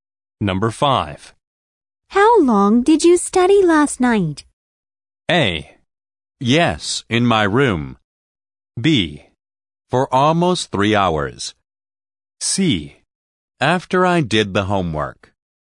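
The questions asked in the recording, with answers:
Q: How long did you study last night?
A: B: For almost 3 hours.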